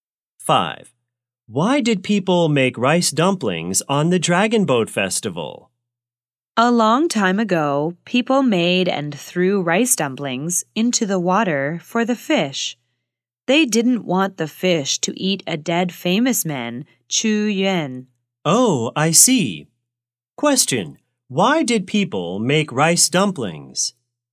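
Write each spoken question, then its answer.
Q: why did people make rice dumplings?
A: To throw them into the water so the fish wouldn't eat Chu Yuan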